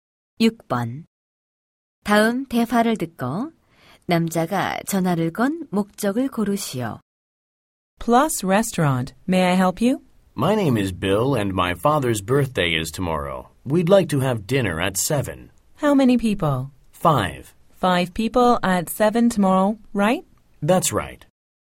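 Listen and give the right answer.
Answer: 식당 예약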